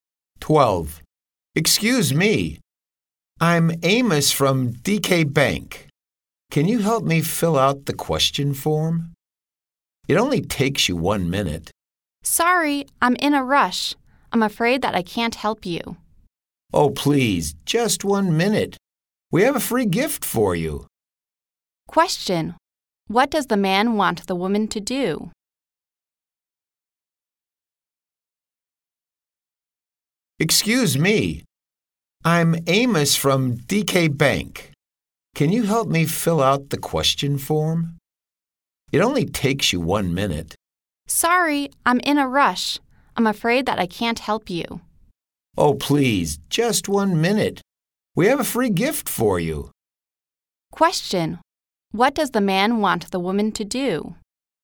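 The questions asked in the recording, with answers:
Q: What does the man want the woman to do?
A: Fill out the question form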